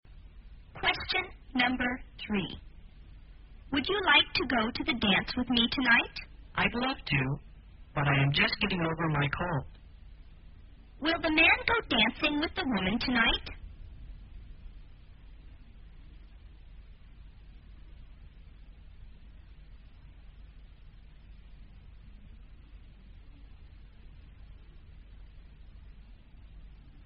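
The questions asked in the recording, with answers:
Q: Will the man go dancing with the woman tonight?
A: No, he is just getting over a cold.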